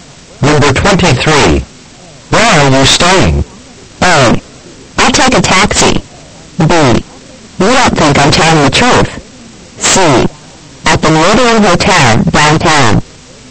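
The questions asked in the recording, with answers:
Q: Where are you staying?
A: C: At the Meridian Hotel, downtown.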